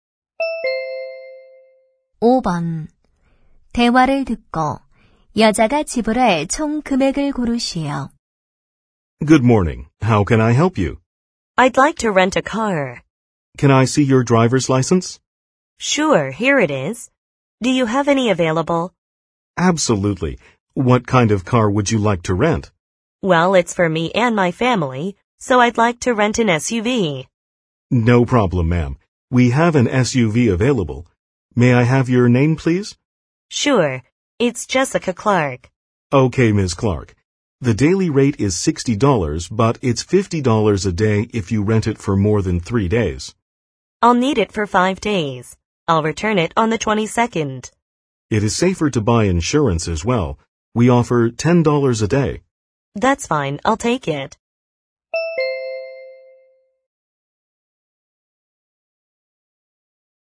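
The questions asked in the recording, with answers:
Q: 대화를 듣고 여자가 지불할 총 금액을 고르시오.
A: $300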